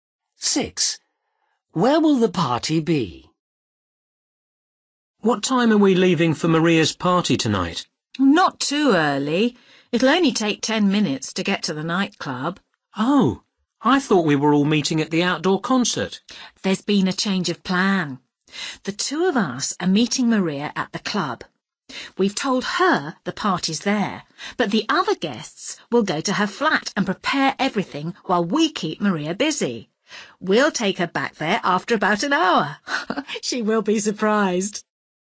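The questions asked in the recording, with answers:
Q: Where will the party be?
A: at Maria's flat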